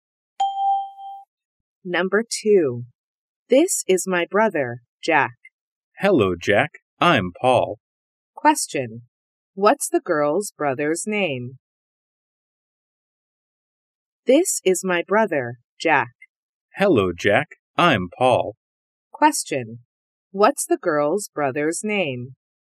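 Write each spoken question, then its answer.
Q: What's the girl's brother's name?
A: Jack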